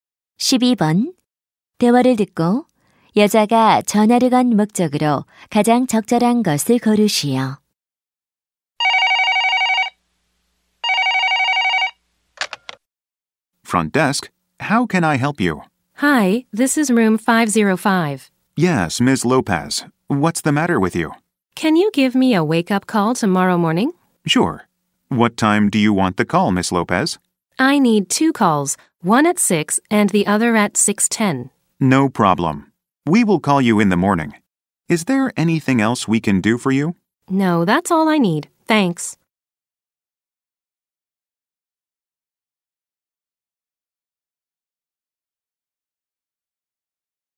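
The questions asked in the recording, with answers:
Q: 대화를 듣고 여자가 전화를 건 목적으로 가장 적절한 것을 고르시오.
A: 모닝콜 요청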